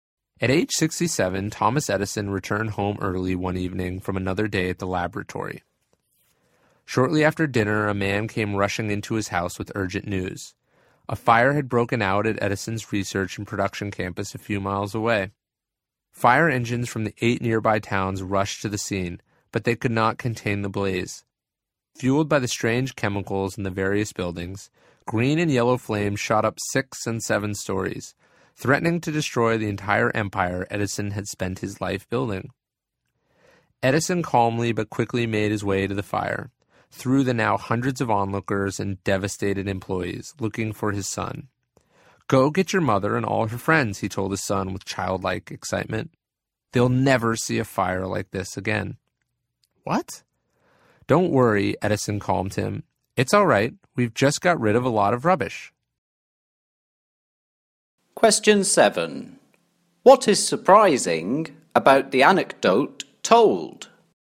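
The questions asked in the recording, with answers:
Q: What is surprising about the anecdote told?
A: Edison reacted calmly, even excitedly, to the fire destroying his life's work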